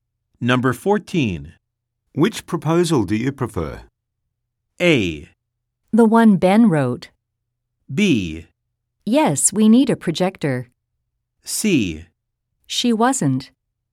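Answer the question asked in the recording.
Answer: A: The one Ben wrote.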